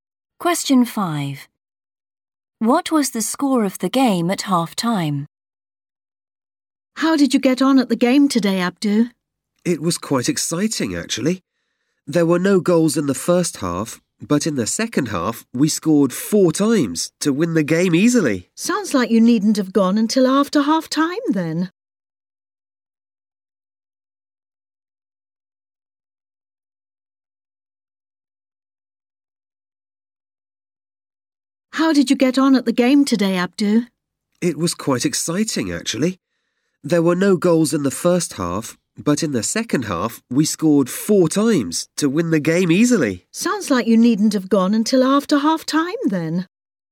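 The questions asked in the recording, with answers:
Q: What was the score of the game at half-time?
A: 0-0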